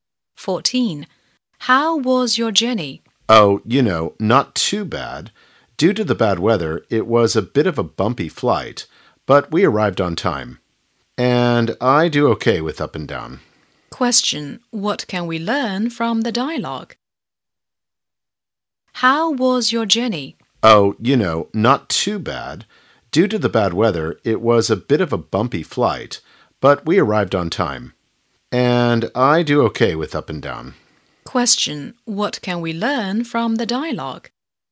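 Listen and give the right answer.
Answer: The flight was bumpy but arrived on time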